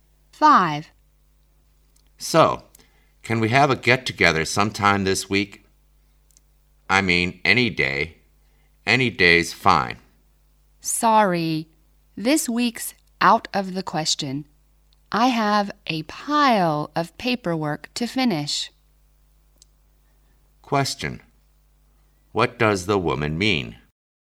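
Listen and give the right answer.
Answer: She is too busy with paperwork to get together this week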